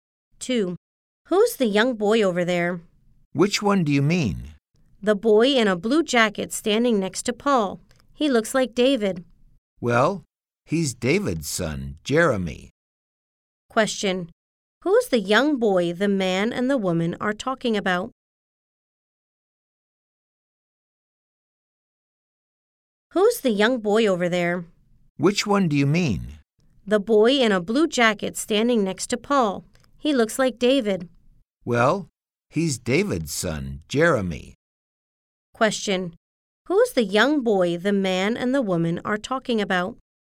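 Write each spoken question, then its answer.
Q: Who's the young boy the man and the woman are talking about?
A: David's son, Jeremy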